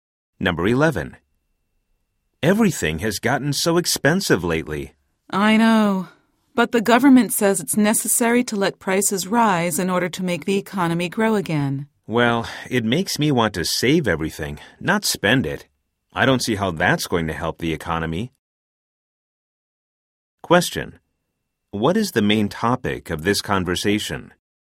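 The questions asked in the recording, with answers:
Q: What is the main topic of this conversation?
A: Rising prices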